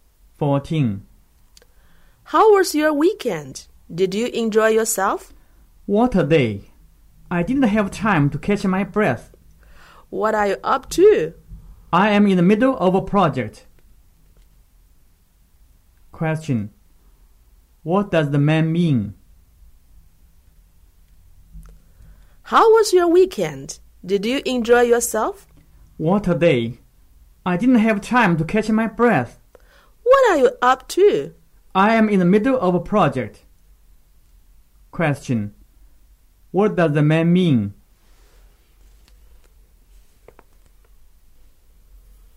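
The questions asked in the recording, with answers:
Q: What does the man mean?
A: He was very busy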